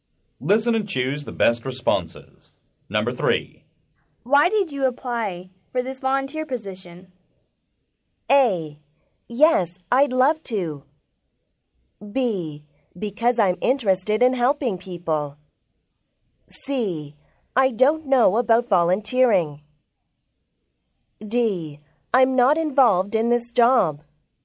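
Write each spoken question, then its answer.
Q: Why did you apply for this volunteer position?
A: B: Because I'm interested in helping people.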